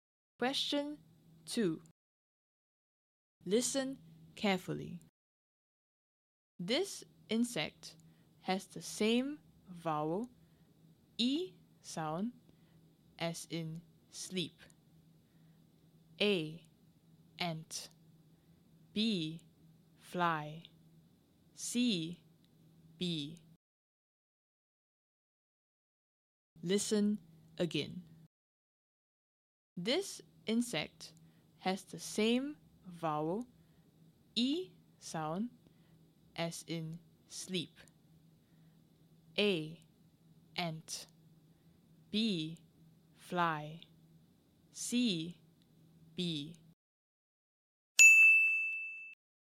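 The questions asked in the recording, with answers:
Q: This insect has the same vowel, E sound, as in sleep.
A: C: bee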